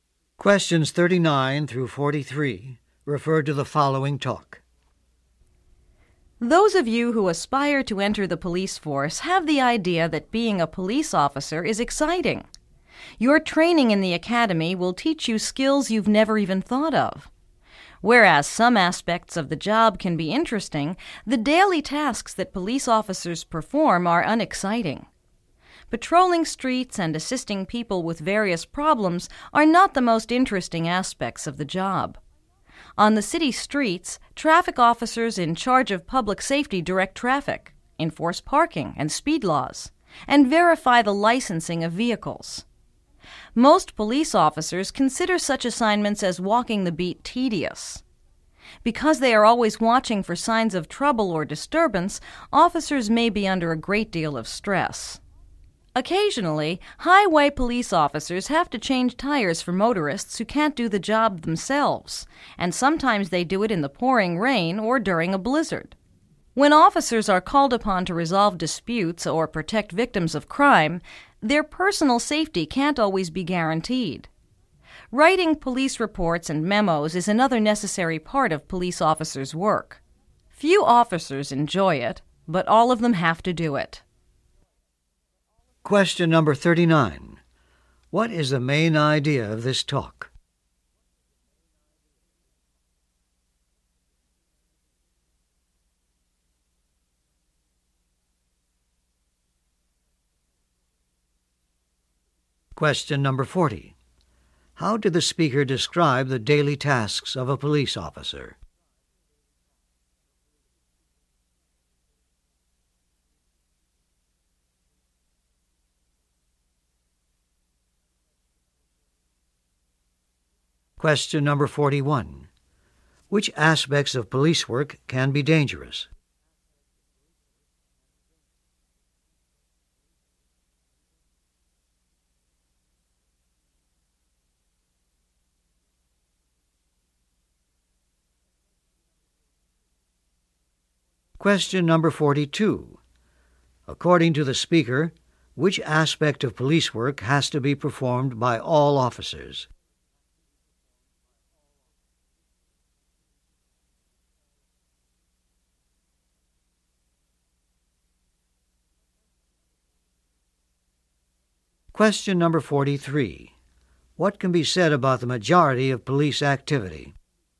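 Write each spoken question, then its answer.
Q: How did the speaker describe the daily tasks of a police officer?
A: Unexciting

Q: Which aspects of police work can be dangerous?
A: Resolving disputes and protecting crime victims

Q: According to the speaker, which aspect of police work has to be performed by all officers?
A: Writing police reports and memos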